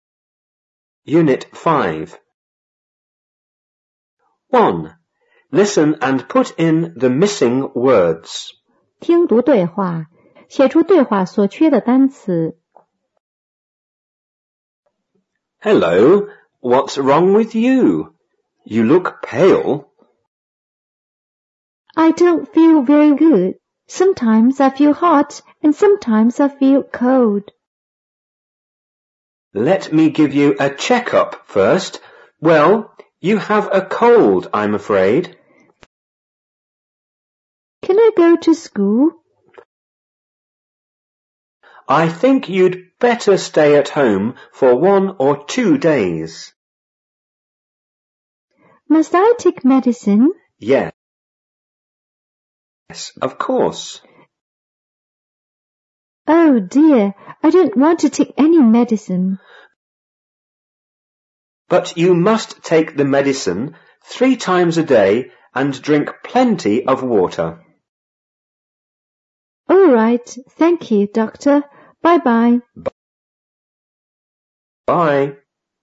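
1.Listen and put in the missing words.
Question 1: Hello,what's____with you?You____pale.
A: wrong; look

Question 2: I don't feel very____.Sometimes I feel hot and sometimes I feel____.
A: good; cold

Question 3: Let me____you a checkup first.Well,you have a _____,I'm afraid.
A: give; cold

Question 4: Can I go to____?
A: school

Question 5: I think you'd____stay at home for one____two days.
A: better; or

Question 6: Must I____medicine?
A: take

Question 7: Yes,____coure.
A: of

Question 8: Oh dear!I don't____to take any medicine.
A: want

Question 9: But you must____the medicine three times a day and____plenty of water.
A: take; drink

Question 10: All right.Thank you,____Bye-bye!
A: doctor

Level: 五年级下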